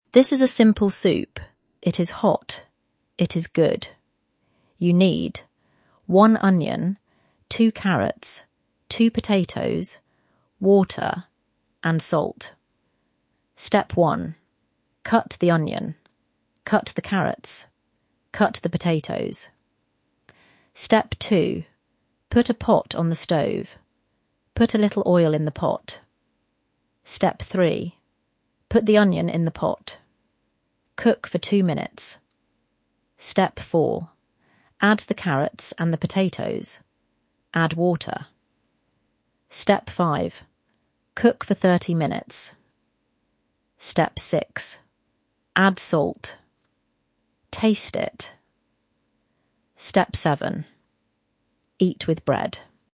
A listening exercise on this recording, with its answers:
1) What do you do first?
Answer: Cut the onion, the carrots, and the potatoes.

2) What do you put in the pot first?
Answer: A little oil. Then the onion.

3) How long do you cook the soup?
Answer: Thirty minutes

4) What do you eat with the soup?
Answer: Bread.

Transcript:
This is a simple soup. It is hot. It is good.
You need
one onion, two carrots, two potatoes, water, and salt.
Step 1. Cut the onion. Cut the carrots. Cut the potatoes.
Step 2. Put a pot on the stove. Put a little oil in the pot.
Step 3. Put the onion in the pot. Cook for two minutes.
Step 4. Add the carrots and the potatoes. Add water.
Step 5. Cook for thirty minutes.
Step 6. Add salt. Taste it.
Step 7. Eat with bread.